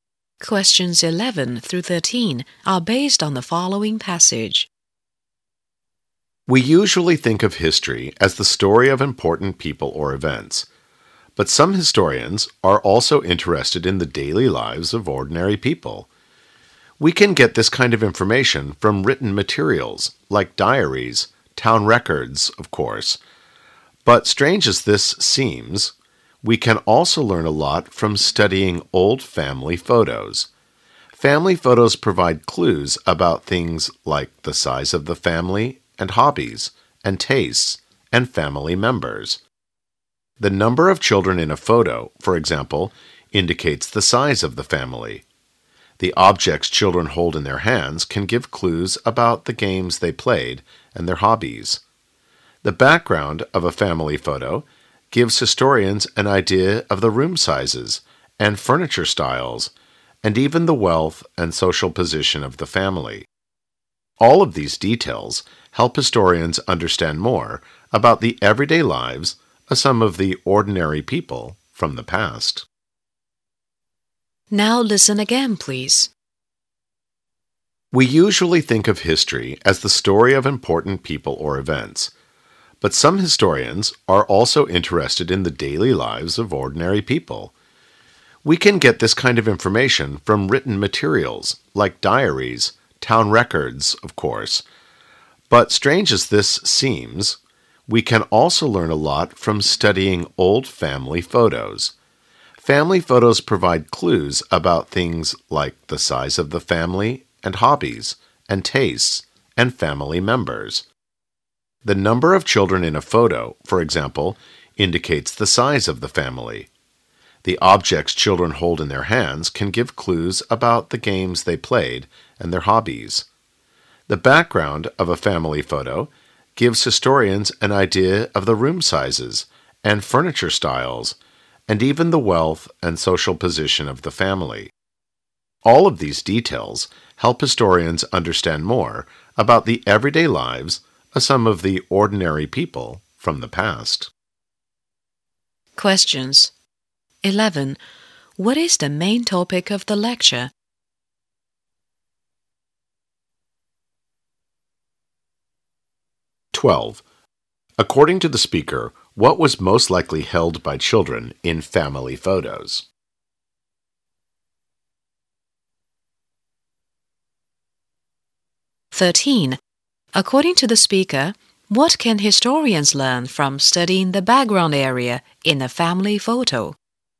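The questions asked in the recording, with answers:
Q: What is the main topic of the lecture?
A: What historians can learn about ordinary people's daily lives from old family photos

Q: According to the speaker, what can historians learn from studying the background area in a family photo?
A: Room sizes, furniture styles, and the family's wealth and social position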